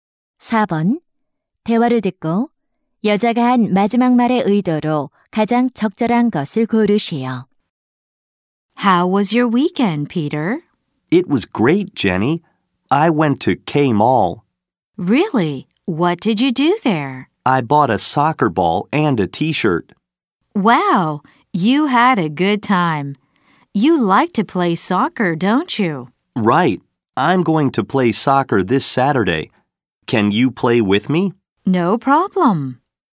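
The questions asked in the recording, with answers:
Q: 대화를 듣고 여자가 한 마지막 말의 의도로 가장 적절한 것을 고르시오.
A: 수락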